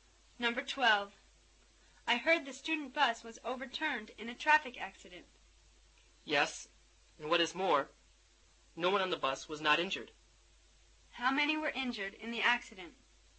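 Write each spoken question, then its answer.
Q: How many were injured in the accident?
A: Everyone on the bus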